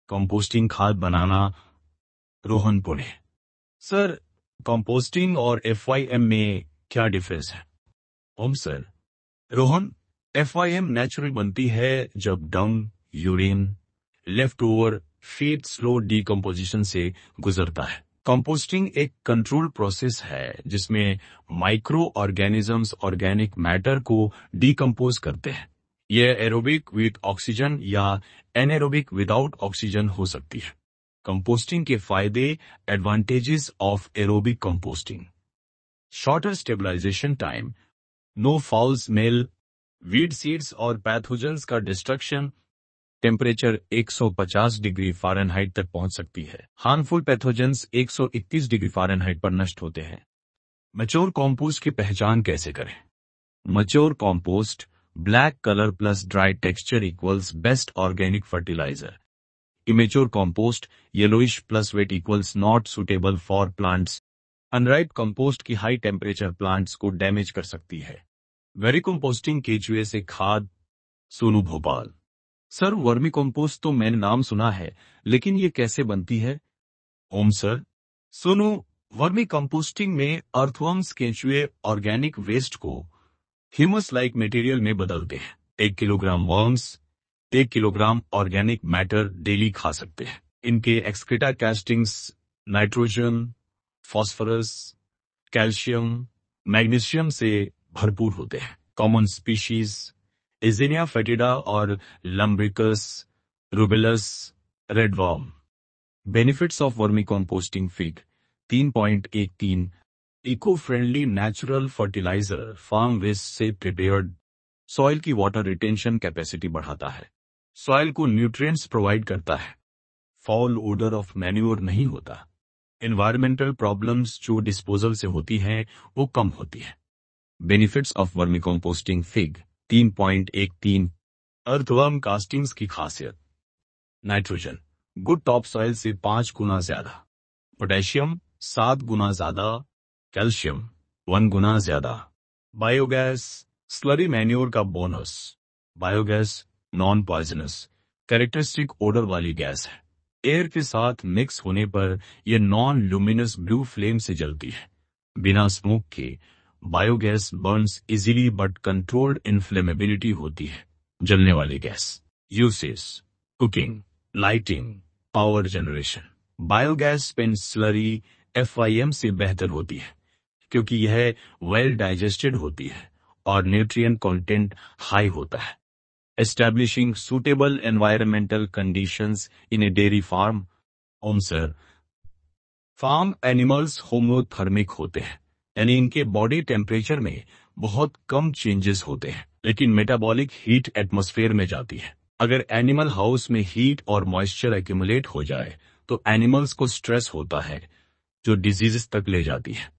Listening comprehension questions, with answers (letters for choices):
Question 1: Composting can be done ___.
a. aerobically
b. anaerobically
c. Both (a) and (b)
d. None of these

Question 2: For which purpose is biogas used?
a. Household cooking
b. Lighting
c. Power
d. All of these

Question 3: Vermicompost is the excreta of ___ rich in humus and nutrients.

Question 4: Biogas burns with a non-luminous ___ coloured flame without producing any smoke.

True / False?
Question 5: Black colour and dryness is the indication of immature compost.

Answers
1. c
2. d
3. earthworms
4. blue
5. False

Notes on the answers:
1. Composting aerobic और anaerobic दोनों तरीकों से होती है।
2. Biogas cooking, lighting, और power generation तीनों के लिए use होती है।
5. Black और dry = MATURE compost। Yellow और wet = immature।

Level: Class 11